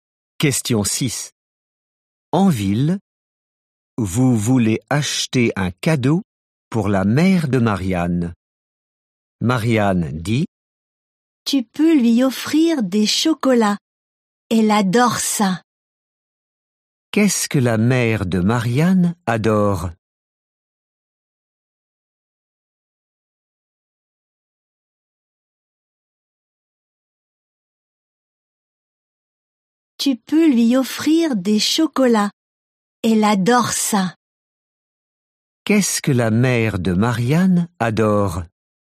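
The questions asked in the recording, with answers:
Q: Qu'est-ce que la mère de Marianne adore ?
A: Les chocolats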